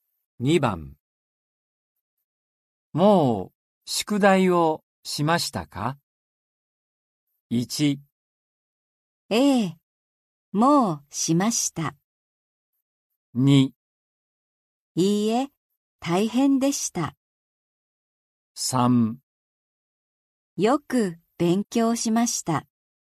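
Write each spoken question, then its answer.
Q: もう宿題をしましたか?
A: 1: ええ、もうしました。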